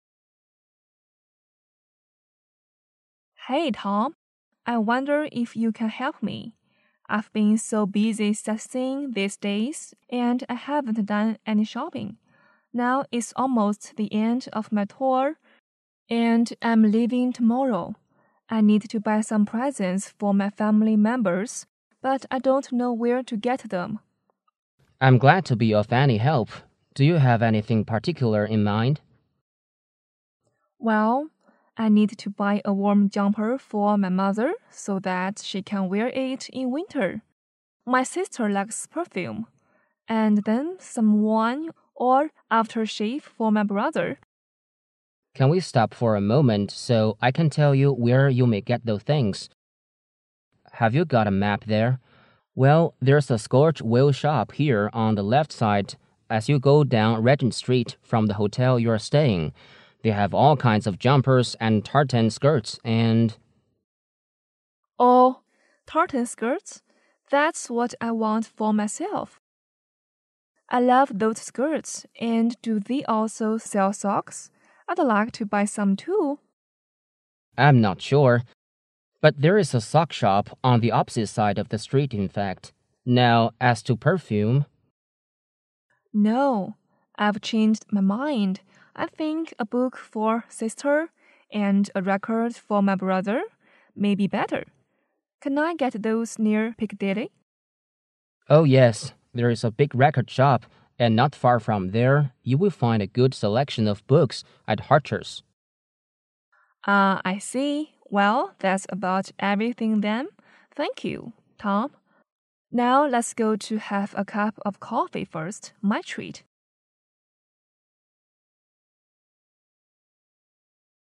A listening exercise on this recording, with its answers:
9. What does the woman want the man to do?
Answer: Be a shopping guide for her.

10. What does the woman want to buy for herself?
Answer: Skirts and socks.

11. What is the woman going to do after the conversation?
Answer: Buy a cup of coffee for the man.

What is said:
A B C D D [听力原文] W: Hey, Tom. I wonder if you can help me. I've been so busy sightseeing these days and I haven't done any shopping. Now it's almost the end of my tour and I'm leaving tomorrow. I need to buy some presents for my family members but I don't know where to get them. M: I'm glad to be of any help. Do you have anything particular in mind? W: Well, I need to buy a warm jumper for my mother so that she can wear it in winter. My sister likes perfume. And then some wine or aftershave for my brother. M: Can we stop for a moment so I can tell you where you may get those things. Have you got a map there? Well, there's a Scorch Wale shop here on the left side as you go down Regent Street from the hotel you are staying. They have all kinds of jumpers and tartan skirts and... W: Oh, tartan skirts? That's what I want for myself. I love those skirts. And do they also sell socks? I'd like to buy some too. M: I'm not sure, but there is a sock shop on the opposite side of the street in fact. Now, as to perfume... W: No. I've changed my mind. I think a book for sister and a record for my brother may be better. Can I get those near Piccadilly? M: Oh, yes. There is big record shop. And not far from there, you will find a good selection of books at Harcher's. W: Ah, I see. Well, that's about everything then. Thank you, Tom. Now let's go to have a cup of coffee first. My treat.

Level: 公共英语三级